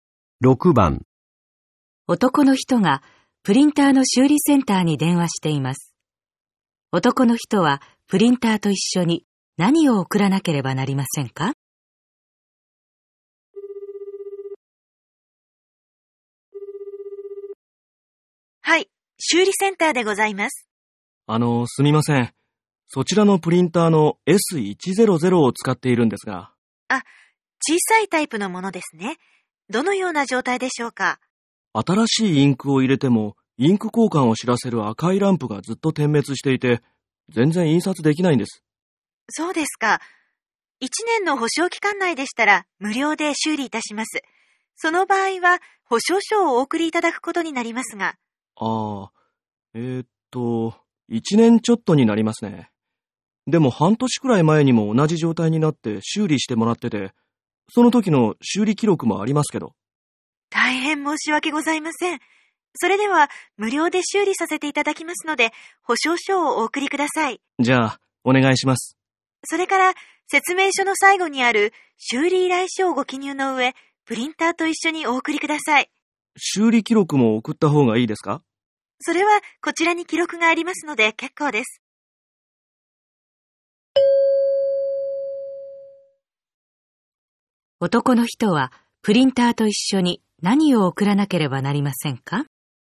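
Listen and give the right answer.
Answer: 保証書と修理依頼書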